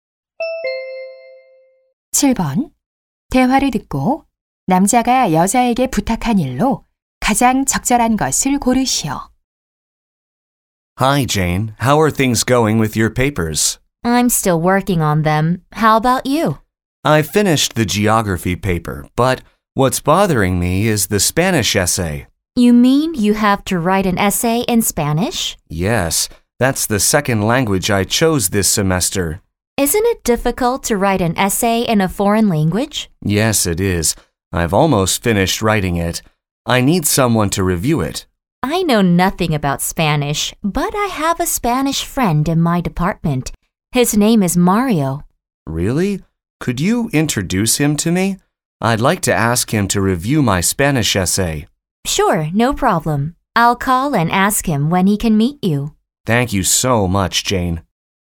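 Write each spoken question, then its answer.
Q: 대화를 듣고 남자가 여자에게 부탁한 일로 가장 적절한 것을 고르시오.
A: 스페인 친구(마리오)를 소개해 주기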